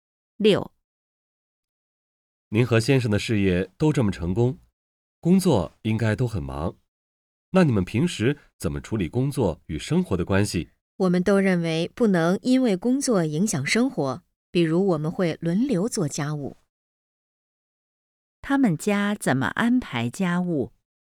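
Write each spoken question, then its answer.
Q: 他们家怎么安排家务?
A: 轮流做家务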